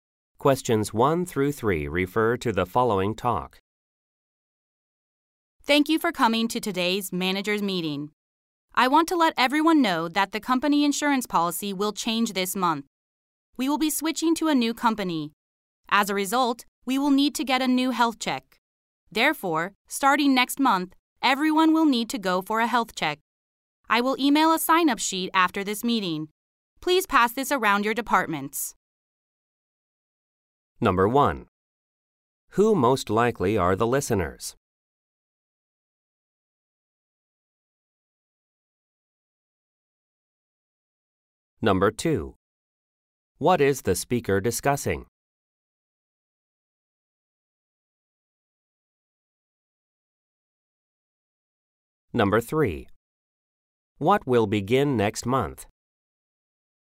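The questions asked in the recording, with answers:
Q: Who most likely are the listeners?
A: Managers

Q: What is the speaker discussing?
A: A change in the company insurance policy

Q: What will begin next month?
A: Health checks for everyone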